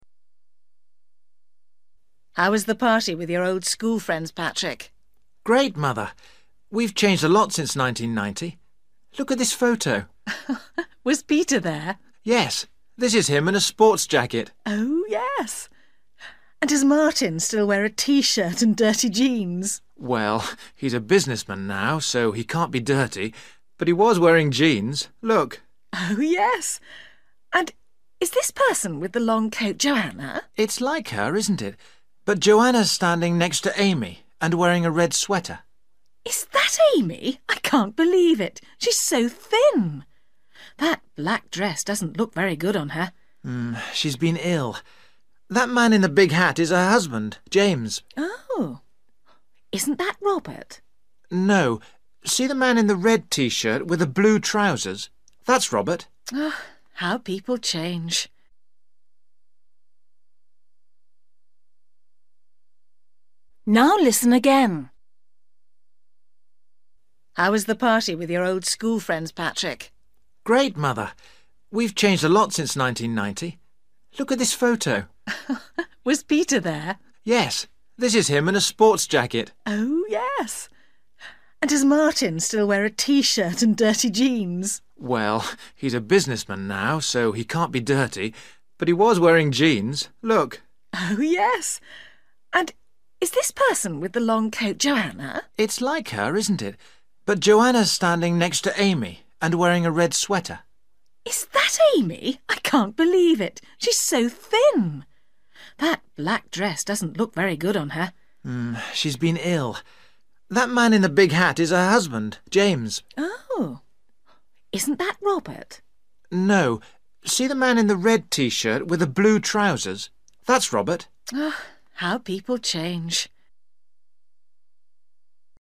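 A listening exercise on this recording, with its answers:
For each question, choose the correct answer.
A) coat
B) dress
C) hat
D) jacket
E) jeans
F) shirt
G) sweater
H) t-shirt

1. Martin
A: E) jeans

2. Joanna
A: G) sweater

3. Amy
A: B) dress

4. James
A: C) hat

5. Robert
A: H) t-shirt

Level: Luyện nghe trình độ A2

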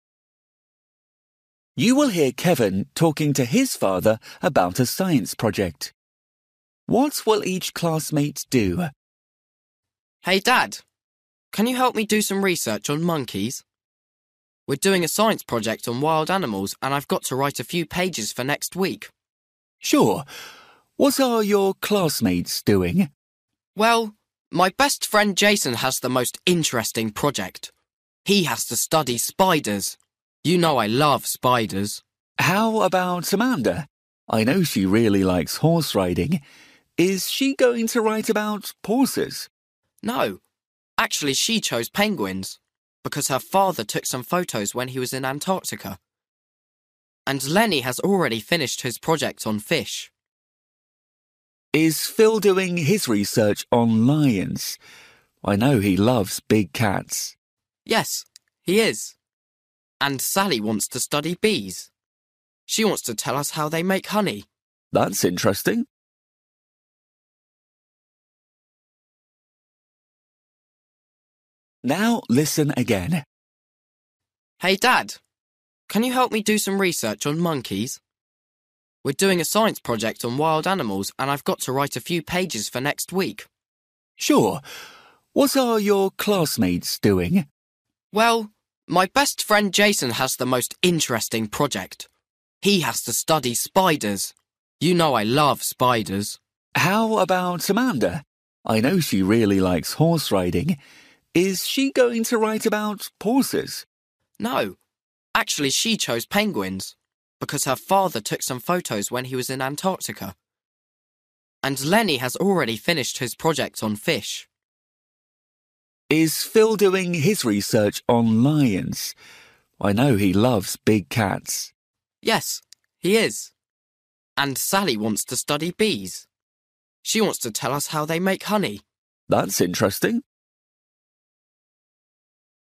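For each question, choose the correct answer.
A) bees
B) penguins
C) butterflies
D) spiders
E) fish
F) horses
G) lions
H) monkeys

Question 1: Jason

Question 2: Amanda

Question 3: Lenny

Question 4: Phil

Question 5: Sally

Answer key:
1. D) spiders
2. B) penguins
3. E) fish
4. G) lions
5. A) bees

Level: Luyện nghe trình độ A2

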